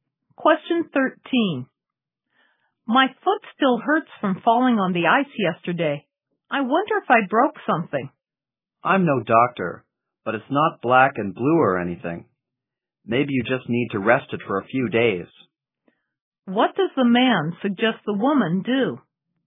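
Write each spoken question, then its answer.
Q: What does the man suggest the woman do?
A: Rest her foot for a few days.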